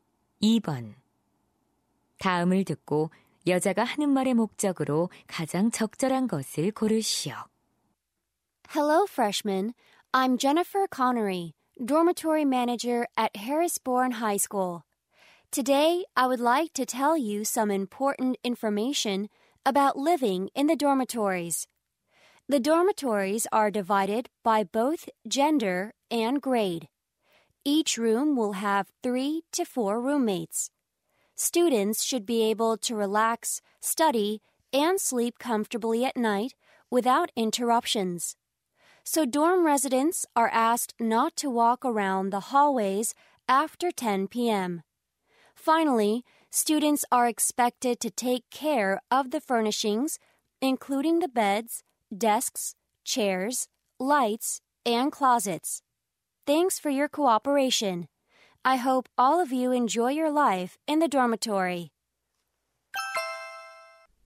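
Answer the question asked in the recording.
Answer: 기숙사 생활 규칙을 안내하려고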